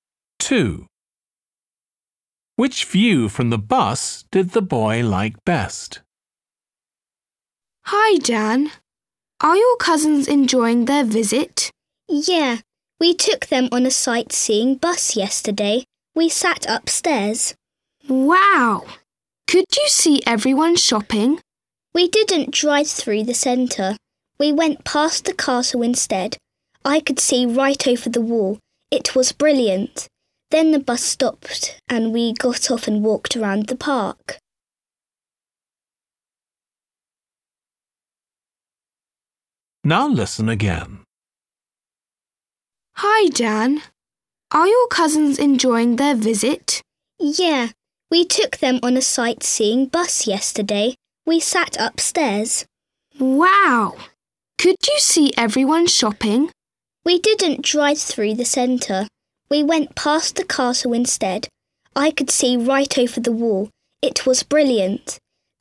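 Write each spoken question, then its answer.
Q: Which view from the bus did the boy like best?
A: the castle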